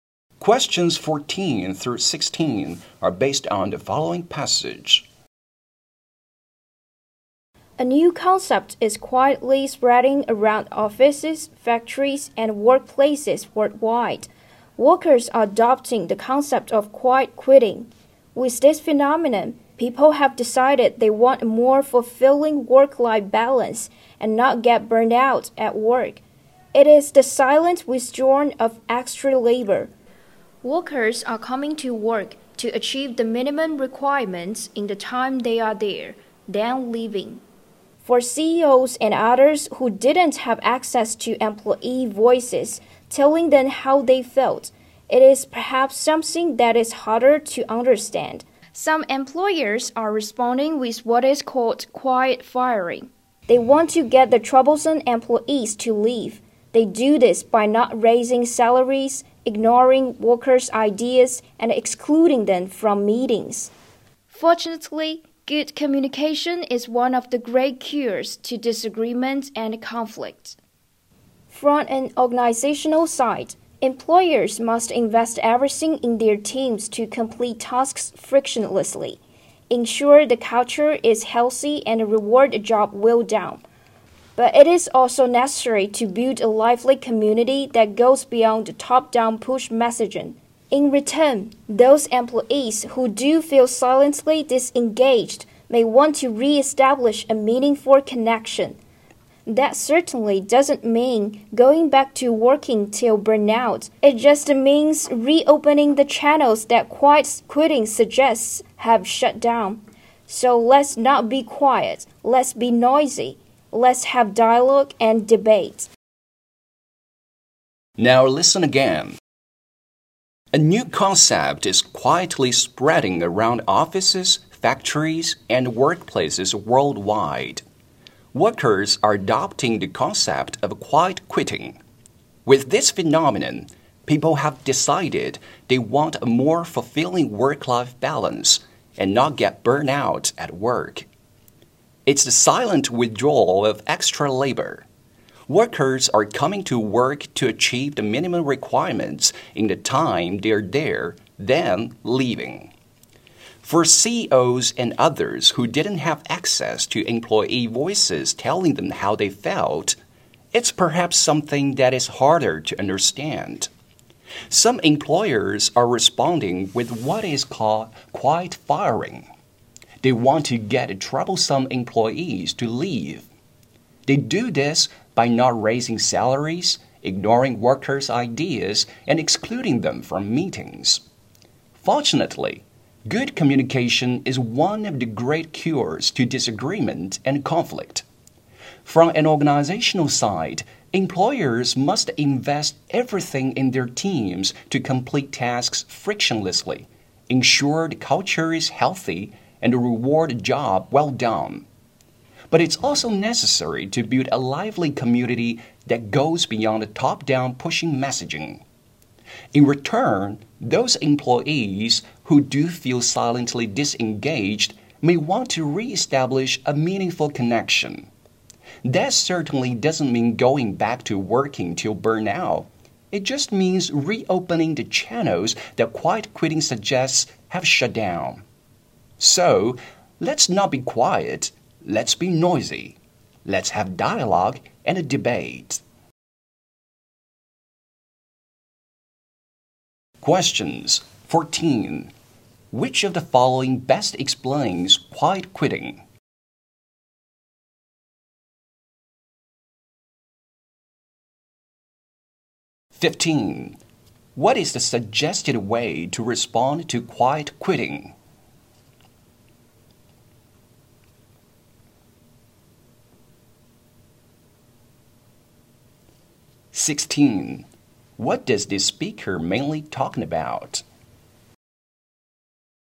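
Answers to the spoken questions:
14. Doing only the minimum required work
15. Good communication
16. Quiet quitting and how to respond to it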